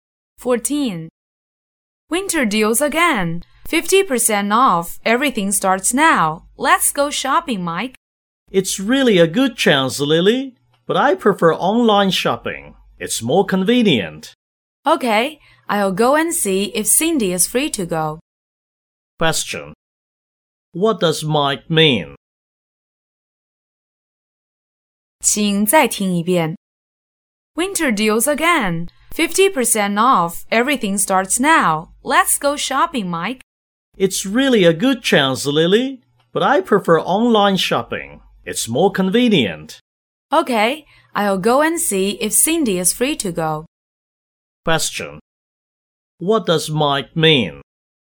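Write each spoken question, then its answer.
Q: What does Mike mean?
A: He prefers shopping online, so he won't go shopping with Lily.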